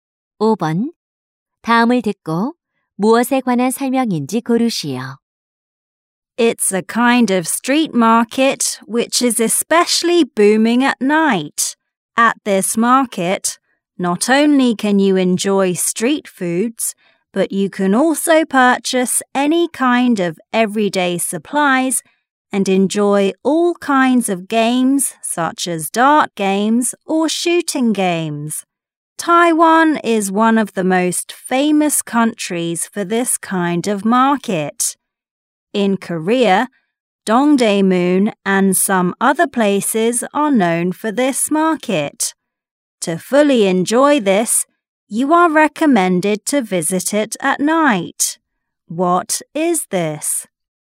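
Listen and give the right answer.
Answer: 야시장 (night market)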